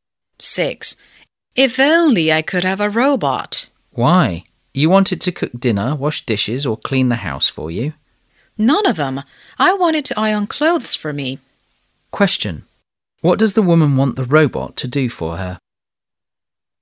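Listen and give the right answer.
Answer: Iron clothes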